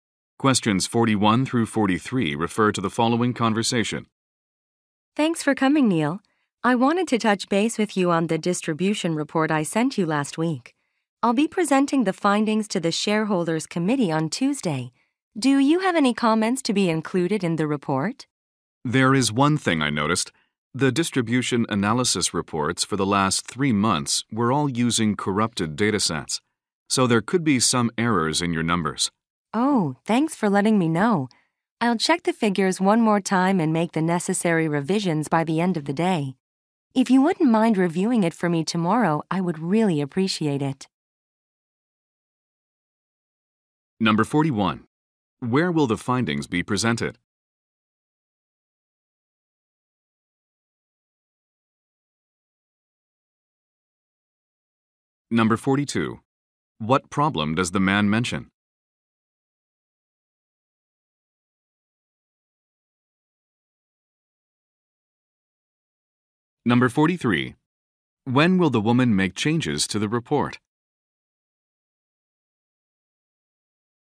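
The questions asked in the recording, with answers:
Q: Where will the findings be presented?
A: At the shareholders' committee meeting.

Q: What problem does the man mention?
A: The reports used corrupted datasets.

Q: When will the woman make changes to the report?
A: By the end of the day.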